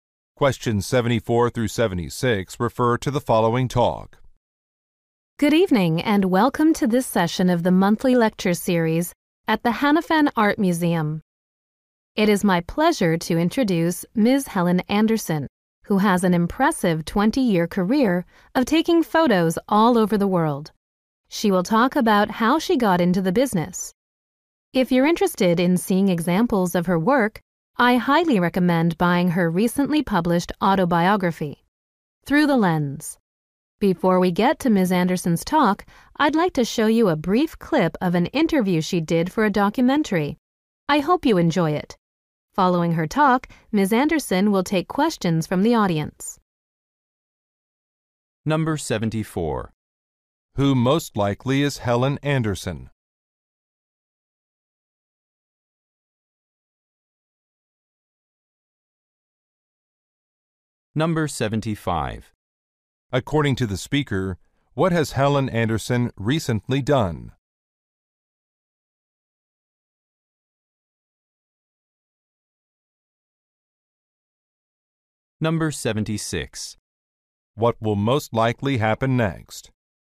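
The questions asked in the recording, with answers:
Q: Who most likely is Helen Anderson?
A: A photographer

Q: According to the speaker, what has Helen Anderson recently done?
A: Published an autobiography

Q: What will most likely happen next?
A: A video clip of an interview will be shown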